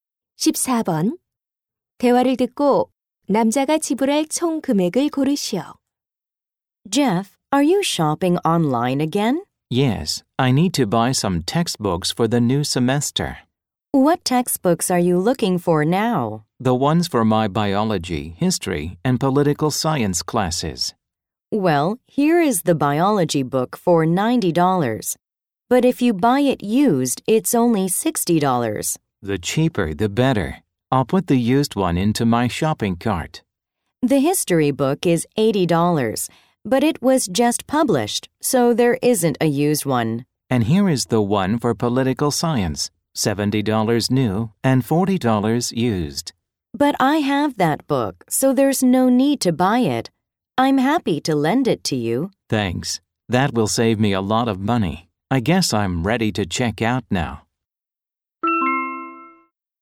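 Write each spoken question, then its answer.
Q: 대화를 듣고 남자가 지불할 총 금액을 고르시오.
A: $140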